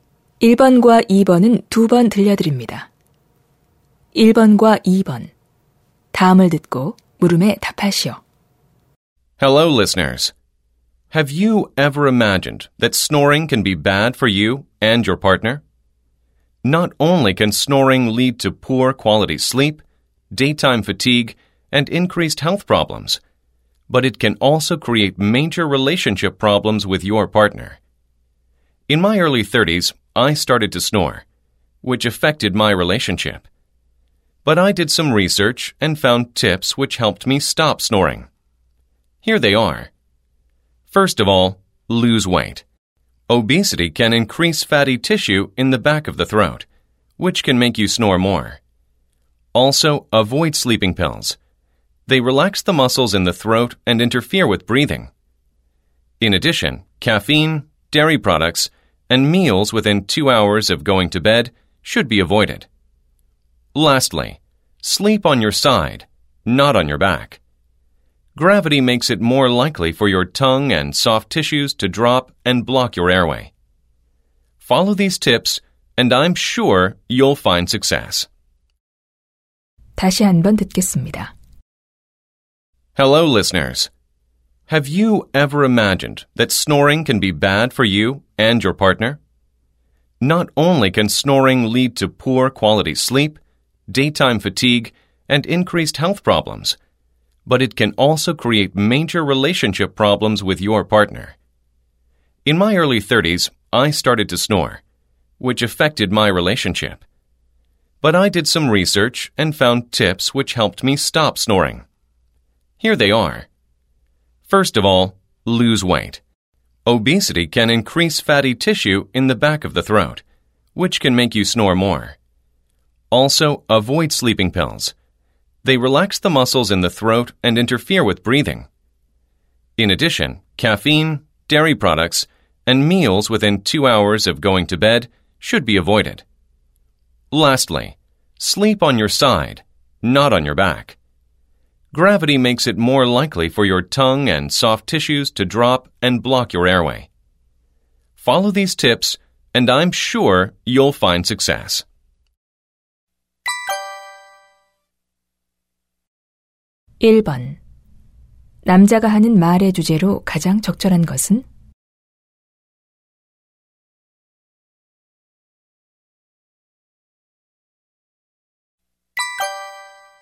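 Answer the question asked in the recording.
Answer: 코골이를 멈추는 방법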